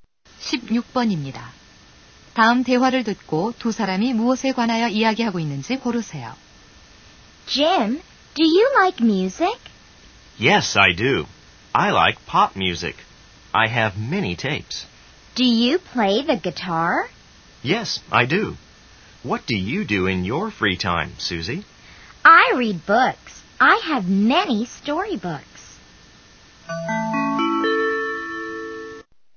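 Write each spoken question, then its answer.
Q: 다음 대화를 듣고 두 사람이 무엇에 관하여 이야기하고 있는지 고르세요.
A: 취미(여가 활동)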